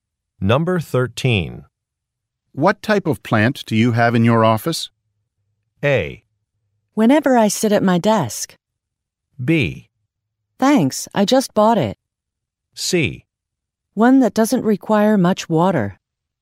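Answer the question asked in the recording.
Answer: C: One that doesn't require much water.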